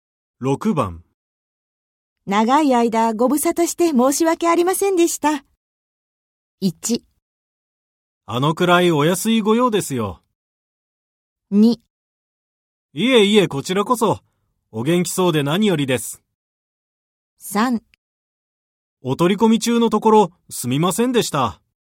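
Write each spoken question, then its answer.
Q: 長い間ご無沙汰して申し訳ありませんでした。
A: 2: いえいえ、こちらこそ。お元気そうで何よりです。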